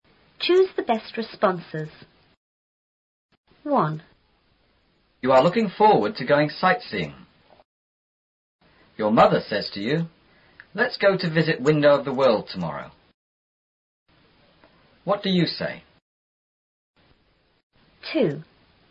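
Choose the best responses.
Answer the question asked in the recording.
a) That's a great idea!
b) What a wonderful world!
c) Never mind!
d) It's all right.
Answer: a) That's a great idea!

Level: 初中英语广州版4B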